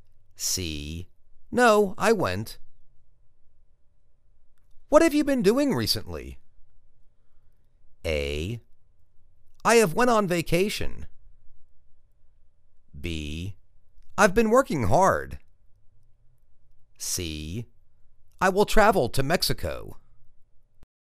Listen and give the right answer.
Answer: I've been working hard.